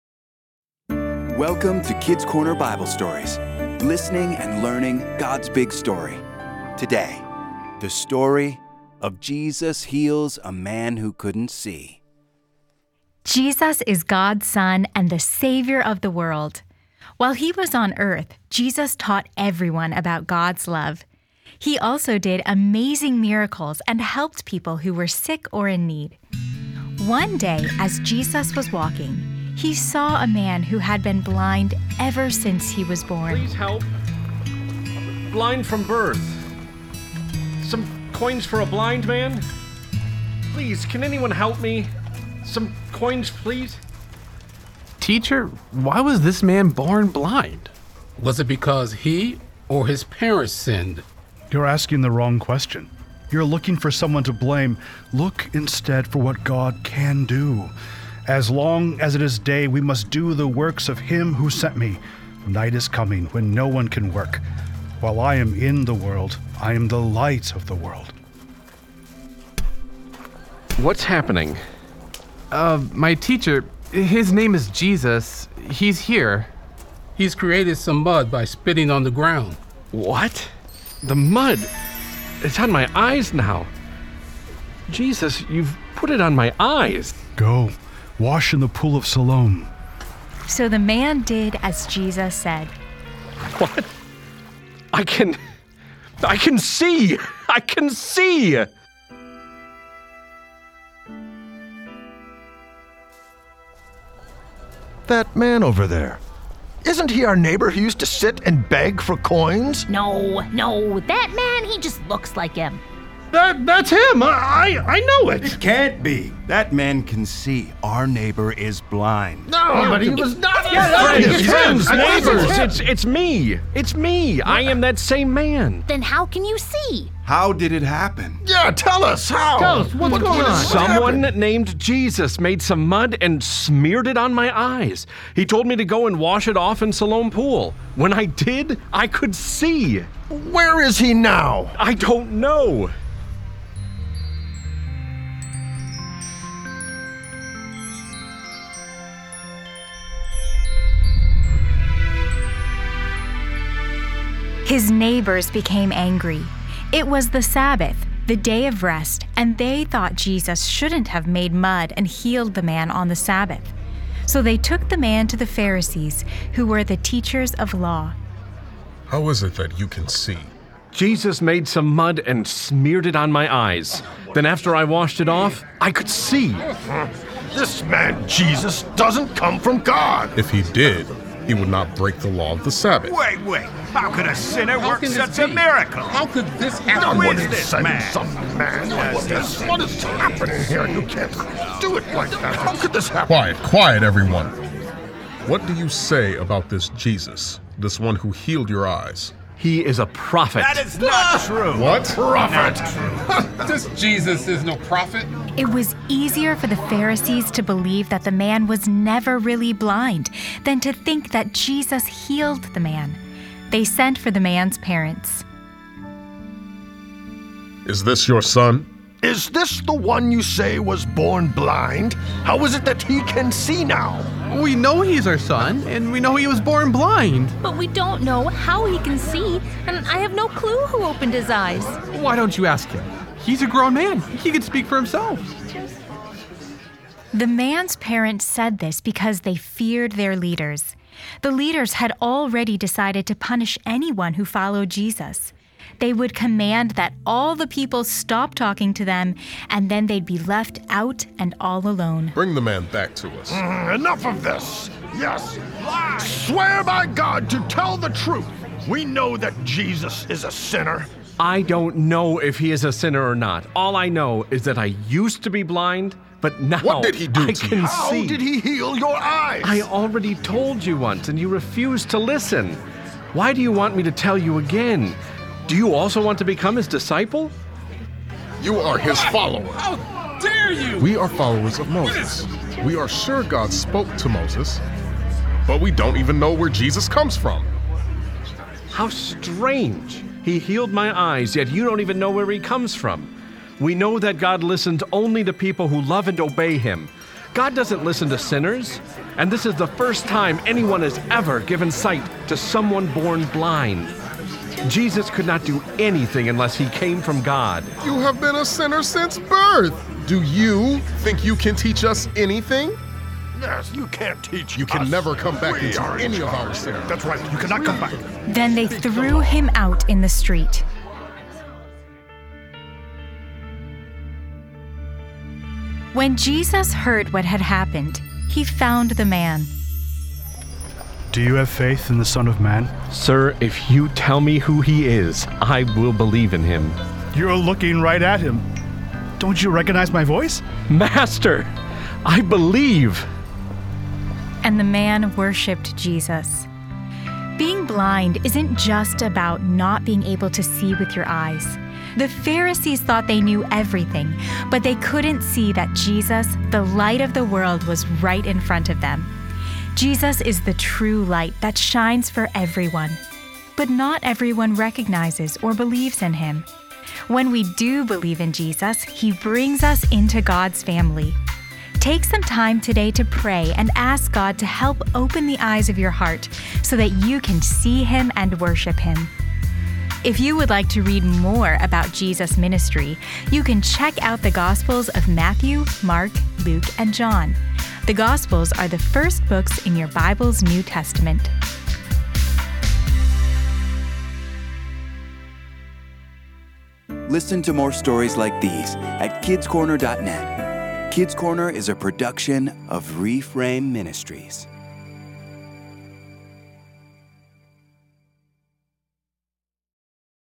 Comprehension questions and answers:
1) What did Jesus put on the man's face?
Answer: He put mud on his face.

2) Where did Jesus tell the man to go?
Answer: He told the man to go to the pool of Siloam.

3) Who brought the man to the Pharisees?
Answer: His neighbors brought him.

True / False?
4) True or False. The Pharisees believed what the man said about Jesus.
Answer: False

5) What did the man do when he finally met Jesus and saw him?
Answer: He worshiped Jesus.

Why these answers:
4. They wanted to punish the man for what he said.